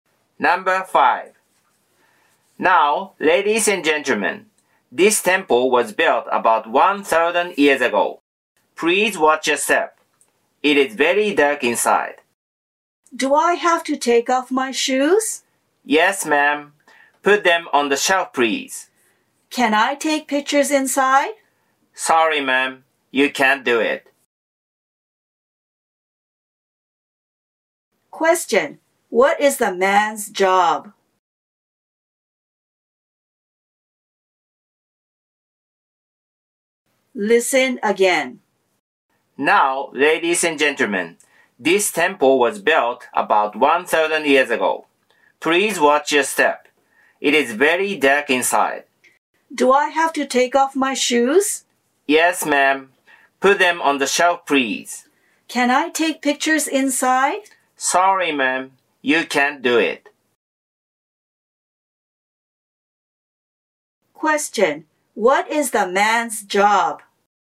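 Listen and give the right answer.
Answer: A tour guide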